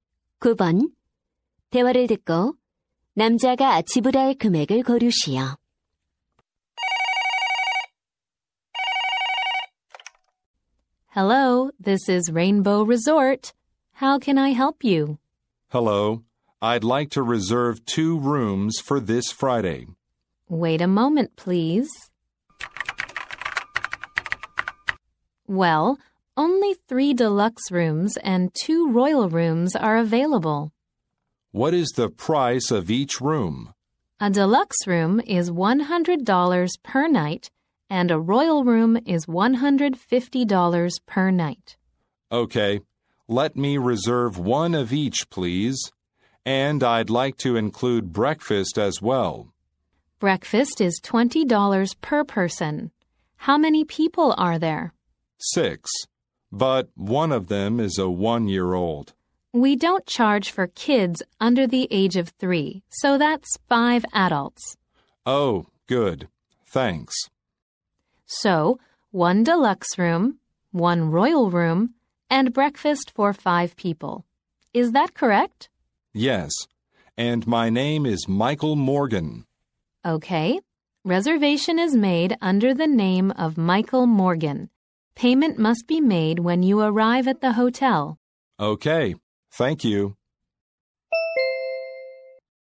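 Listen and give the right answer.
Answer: 350달러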